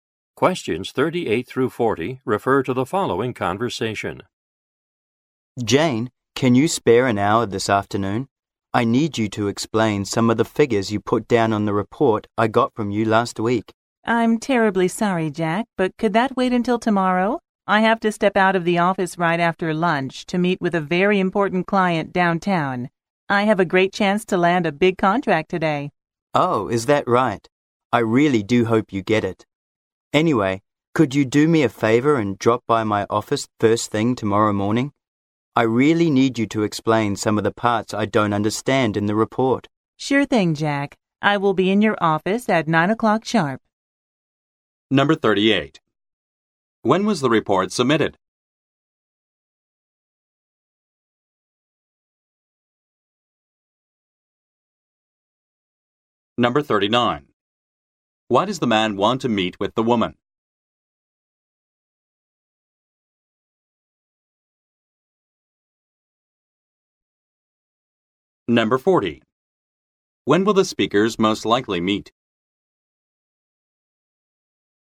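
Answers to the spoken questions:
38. Last week
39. To have her explain figures in the report
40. Tomorrow morning at 9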